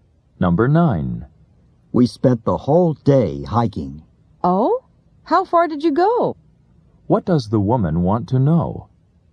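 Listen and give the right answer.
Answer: How far they hiked.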